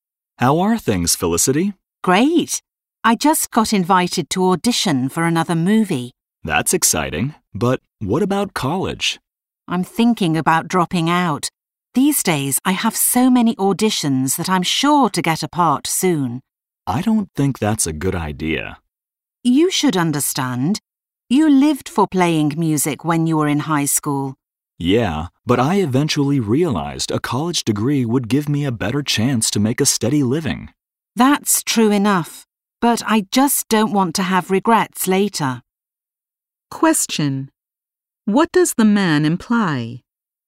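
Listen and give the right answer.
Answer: Felicity should stay in college instead of dropping out to pursue acting.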